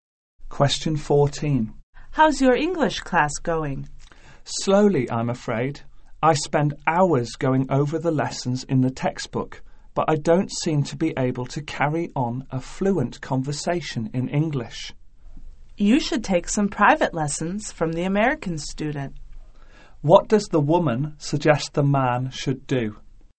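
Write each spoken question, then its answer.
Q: What does the woman suggest the man should do?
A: Take private lessons from the American student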